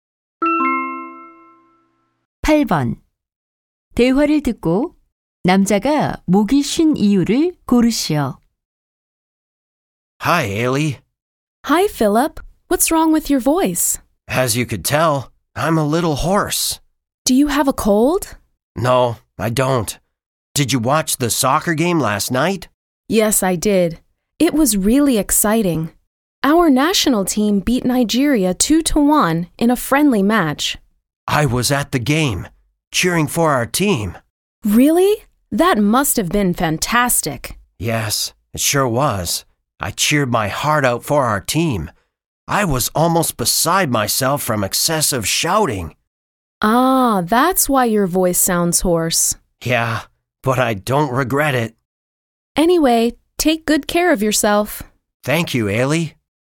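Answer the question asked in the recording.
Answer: 축구 경기에서 응원하며 지나치게 소리를 질러서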